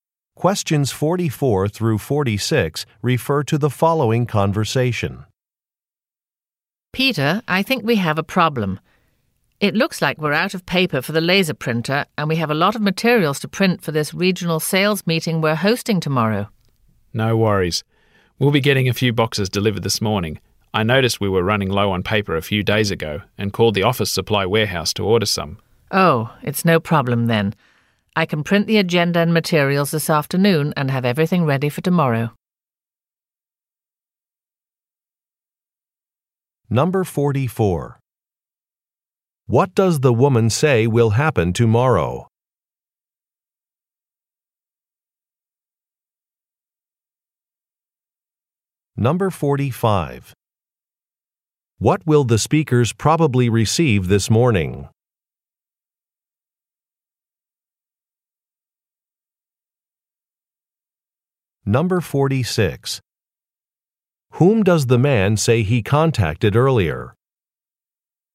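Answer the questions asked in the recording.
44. They will host a regional sales meeting
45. A few boxes of printer paper
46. The office supply warehouse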